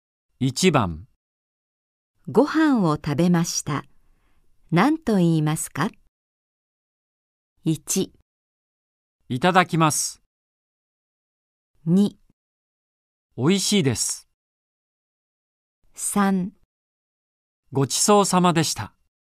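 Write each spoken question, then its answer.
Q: ご飯を食べました。何と言いますか?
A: 3: ごちそうさまでした。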